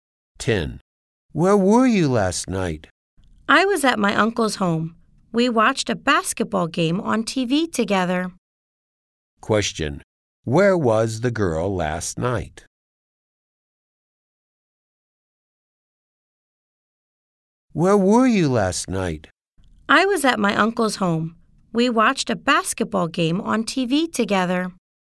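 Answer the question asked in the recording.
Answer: At her uncle's home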